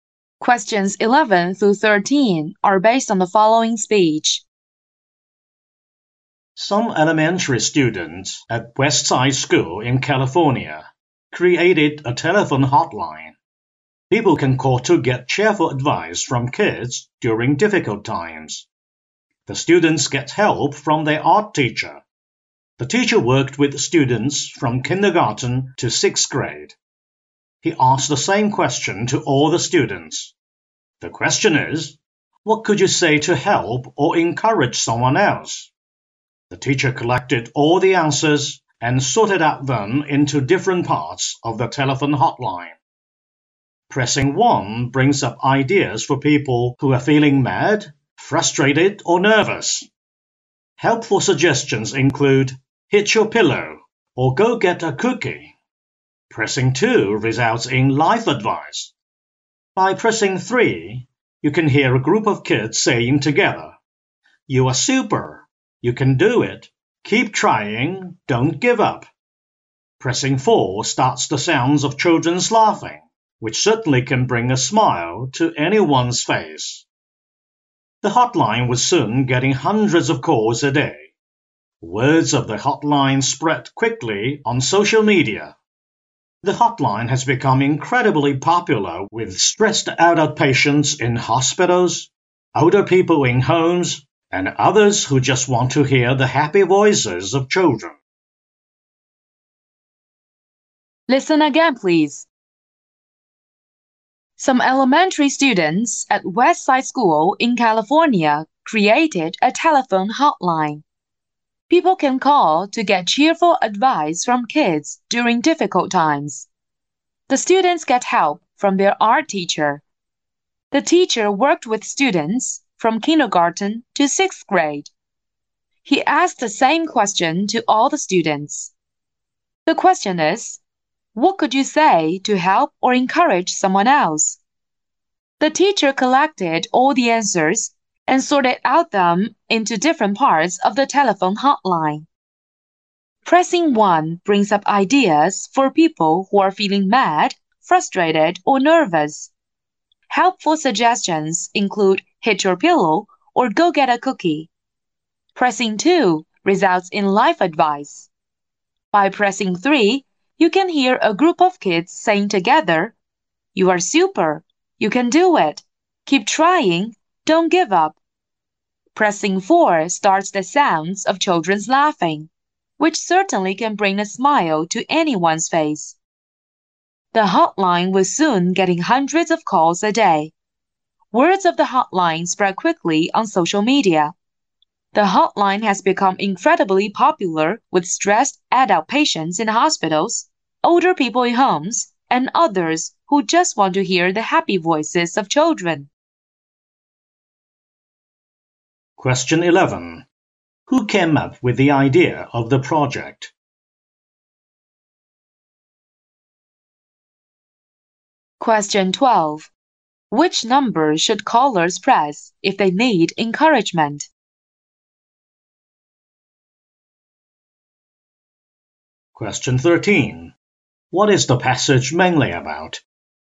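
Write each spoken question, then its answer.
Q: What is the passage mainly about?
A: A hotline where kids give callers cheerful advice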